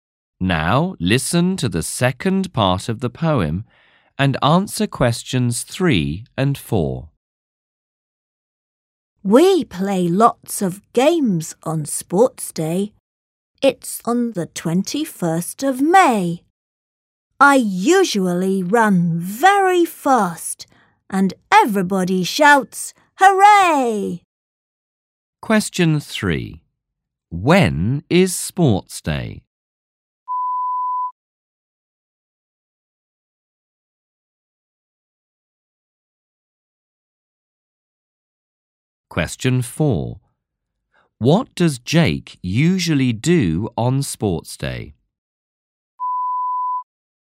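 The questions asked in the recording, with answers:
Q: When is sports day?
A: On the 21st of May

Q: What does Jake usually do on sports day?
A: He runs very fast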